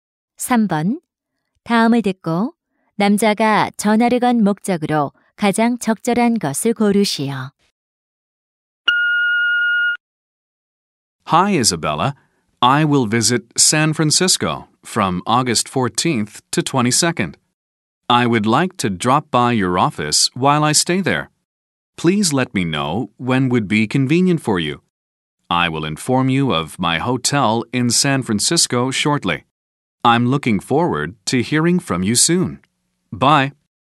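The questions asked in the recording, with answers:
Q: 다음을 듣고 남자가 전화를 건 목적으로 가장 적절한 것을 고르시오.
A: 샌프란시스코 방문 중 사무실을 방문할 편한 시간을 묻기 위해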